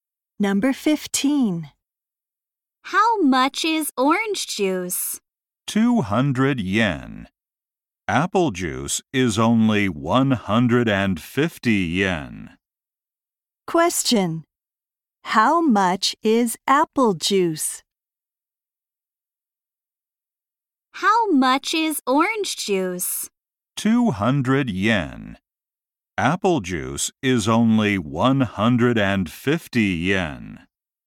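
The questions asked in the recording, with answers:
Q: Question.How much is apple juice?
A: 150 yen.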